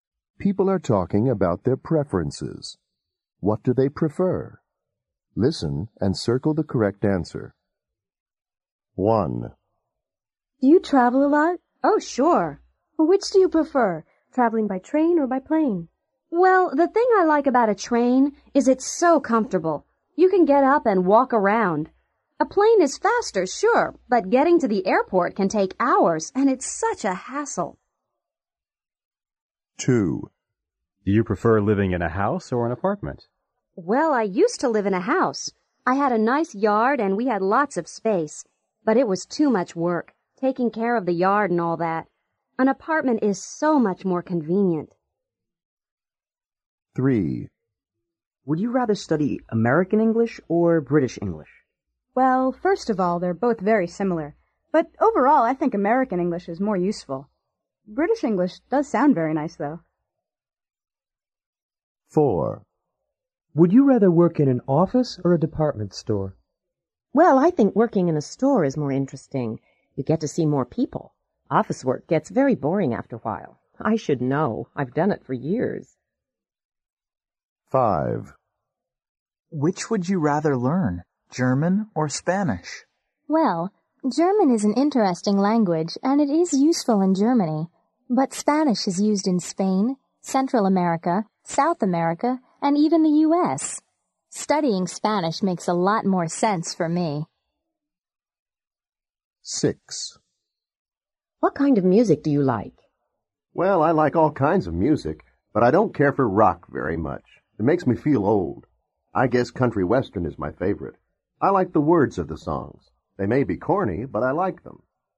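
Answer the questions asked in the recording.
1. By train
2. An apartment
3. American English
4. A department store
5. Spanish
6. Country western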